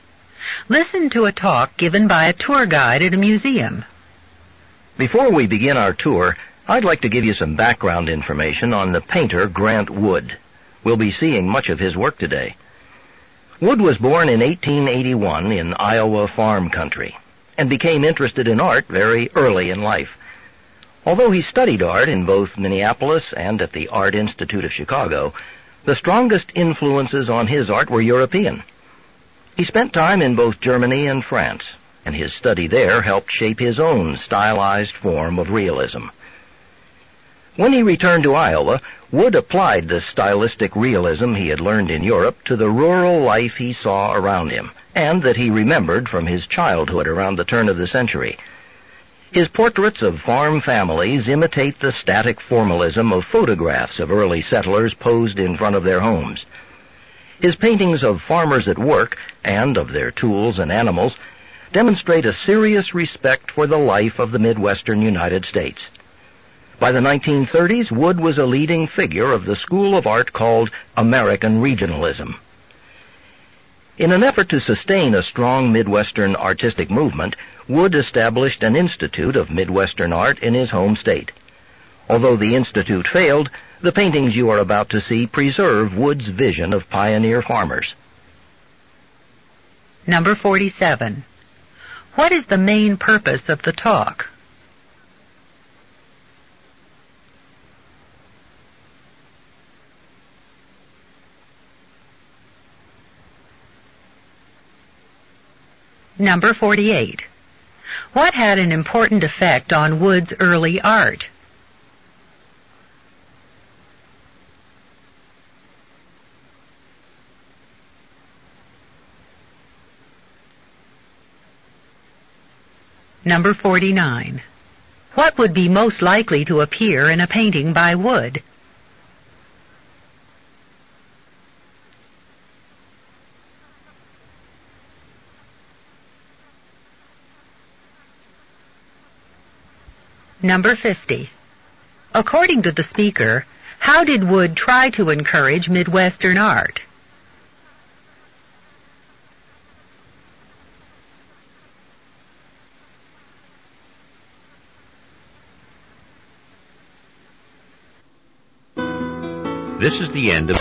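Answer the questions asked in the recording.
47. To give background information on the painter Grant Wood before a museum tour
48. His study in Europe (Germany and France)
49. Farmers at work or a farm family in front of their home
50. He established an institute of Midwestern art in Iowa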